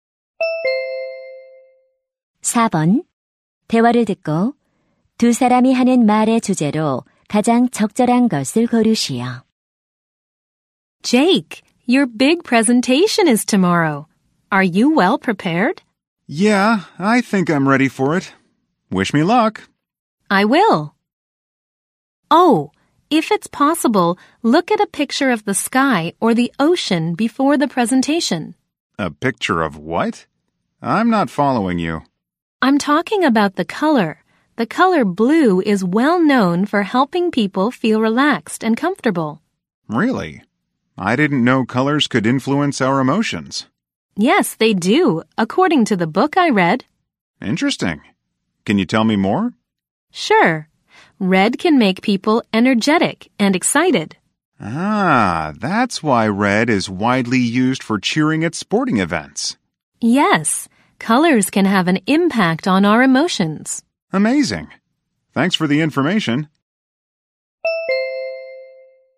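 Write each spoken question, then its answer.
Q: 대화를 듣고 두 사람이 하는 말의 주제로 가장 적절한 것을 고르시오.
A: 색깔이 감정에 미치는 영향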